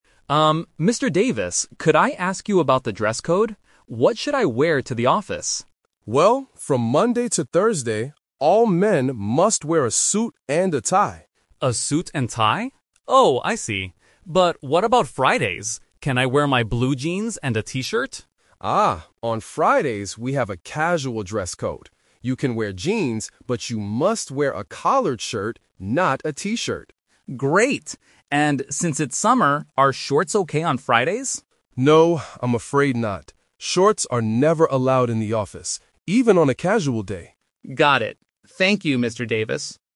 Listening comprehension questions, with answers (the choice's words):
Listen to the conversation between a new employee and an HR manager. Choose the correct answer (A, B, or C).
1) What must men wear to the office from Monday to Thursday?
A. Blue jeans and a T-shirt.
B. A suit and a tie.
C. A company uniform.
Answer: A suit and a tie.

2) What is Alex allowed to wear on Fridays?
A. Blue jeans and a T-shirt.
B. Jeans and a collared shirt.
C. A suit without a tie.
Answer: Jeans and a collared shirt.

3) What does Mr. Davis say about wearing shorts?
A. They are never allowed in the office.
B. They are only allowed on Fridays.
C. They are okay to wear in the summer.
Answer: They are never allowed in the office.

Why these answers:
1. Mr. Davis clearly says, "from Monday to Thursday, all men must wear a suit and a tie." Option (A) is the trap; these are casual clothes mentioned for Friday, not Monday to Thursday. Option (C) is plausible for some jobs, but it is not mentioned in the audio.
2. This question uses the "Twist" technique. Alex asks if he can wear "blue jeans and a T-shirt" (Option A). However, Mr. Davis changes the rule slightly: jeans are okay, "BUT you must wear a collared shirt, not a T-shirt." Option (C) is not mentioned.
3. Mr. Davis clearly states, "Shorts are never allowed in the office." Option (C) is a trap; Alex asks if shorts are okay "since it's summer," but the manager says no. Option (B) is also a trap because Fridays are casual, but shorts are still not allowed.

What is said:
Davis, could I ask you about the dress code? What should I wear to the office?
Mr. Davis: Well, from Monday to Thursday, all men must wear a suit and a tie.
Alex: A suit and tie? Oh, I see. But what about Fridays? Can I wear my blue jeans and a T-shirt?
Mr. Davis: Ah, on Fridays we have a casual dress code. You can wear jeans, but you must wear a collared shirt, not a T-shirt.
Alex: Great! And since it's summer, are shorts okay on Fridays?
Mr. Davis: No, I'm afraid not. Shorts are never allowed in the office, even on a casual day.